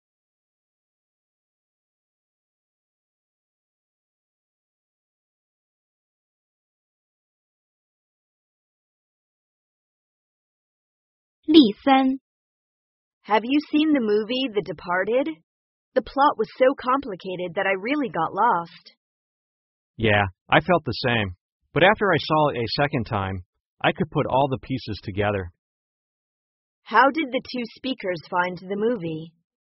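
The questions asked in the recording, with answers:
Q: How did the two speakers find the movie?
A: Hard to follow; the plot was too complicated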